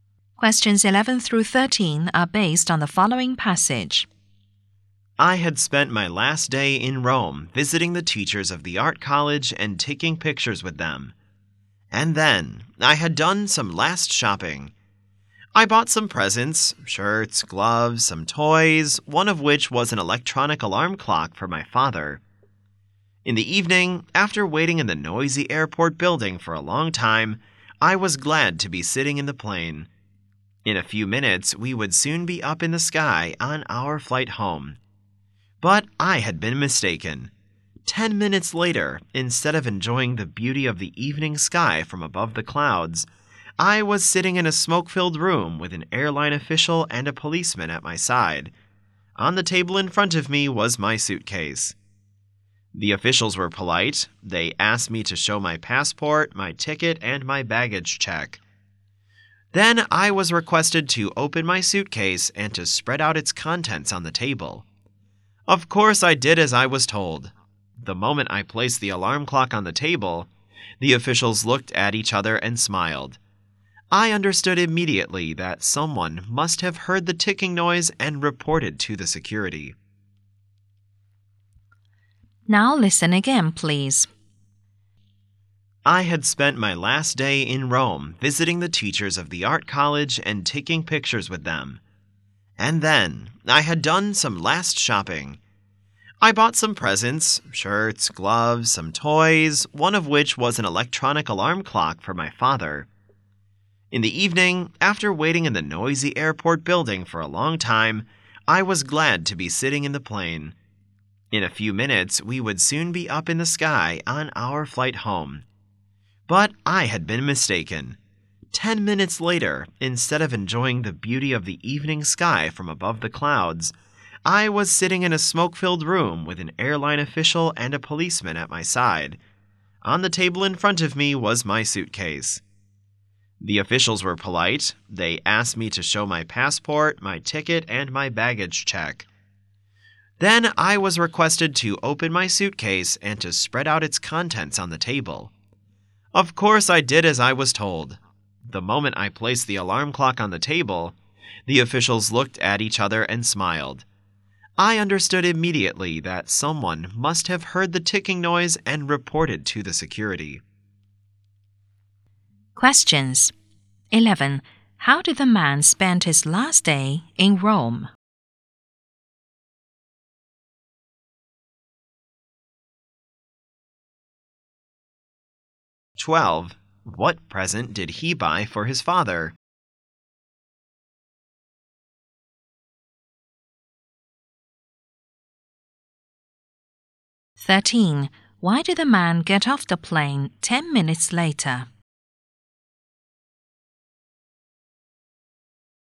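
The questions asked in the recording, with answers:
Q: How did the man spend his last day in Rome?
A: Visiting teachers of the art college, taking pictures with them, and shopping

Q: What present did he buy for his father?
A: An electronic alarm clock

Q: Why did the man get off the plane 10 minutes later?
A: Someone heard the alarm clock ticking and reported it to security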